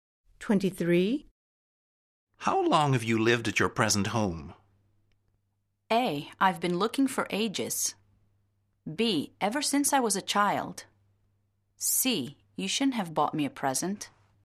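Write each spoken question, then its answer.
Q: How long have you lived at your present home?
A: B: Ever since I was a child.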